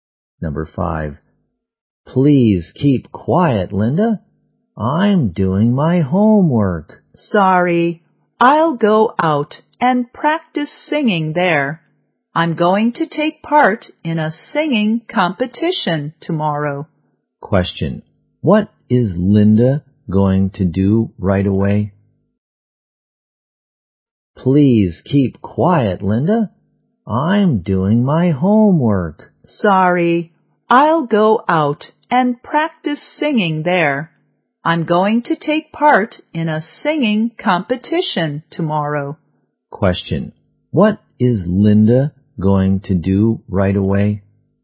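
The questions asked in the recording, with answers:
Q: What is Linda going to do right away?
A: Go out and practice singing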